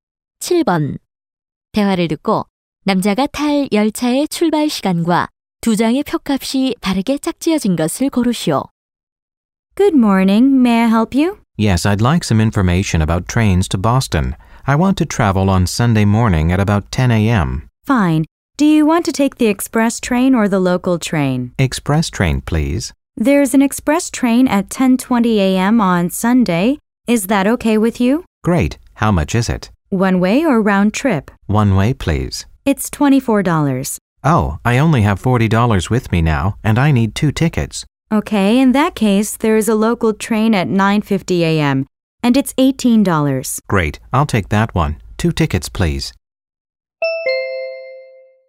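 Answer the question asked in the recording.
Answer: 오전 9시 50분, 36달러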